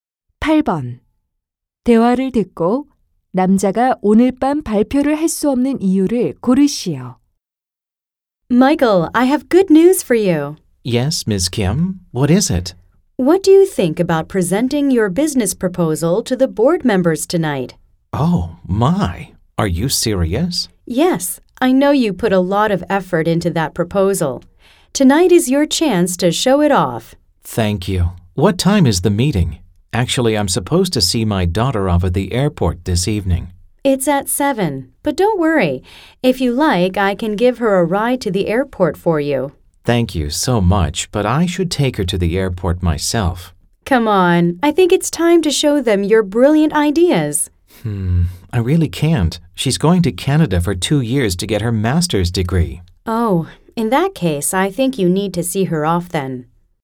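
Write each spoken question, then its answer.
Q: 대화를 듣고 남자가 오늘 밤 발표를 할 수 없는 이유를 고르시오.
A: 딸을 공항에서 배웅해야 해서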